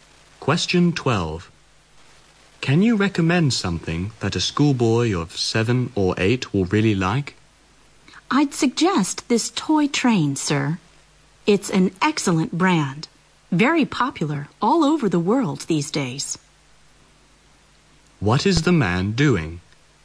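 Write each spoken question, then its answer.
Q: What is the man doing?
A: Buying a present (toy) for a schoolboy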